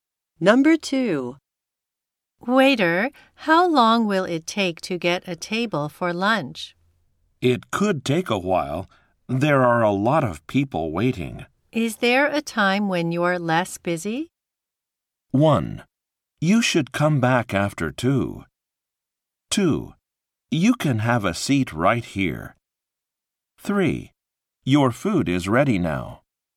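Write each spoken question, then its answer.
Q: Is there a time when you're less busy?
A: 1: You should come back after 2.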